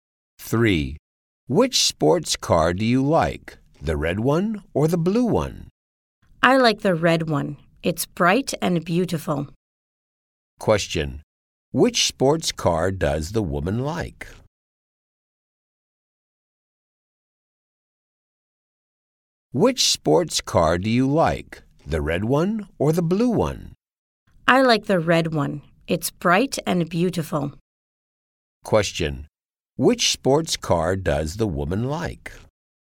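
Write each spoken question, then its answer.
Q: Question. Which sports car does the woman like?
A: The red one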